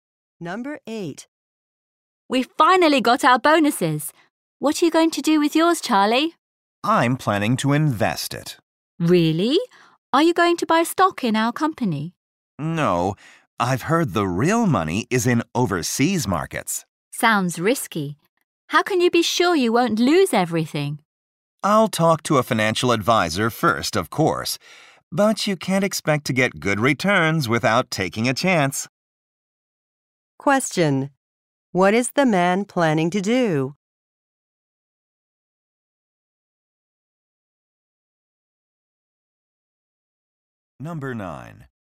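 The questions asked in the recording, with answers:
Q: What is the man planning to do?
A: Invest his bonus in overseas markets after talking to a financial advisor.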